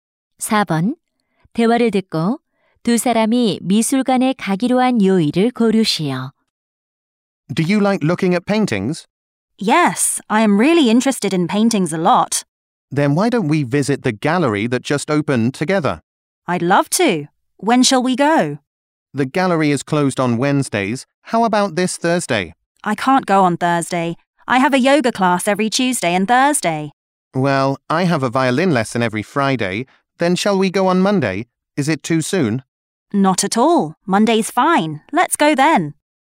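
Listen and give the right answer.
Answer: 월요일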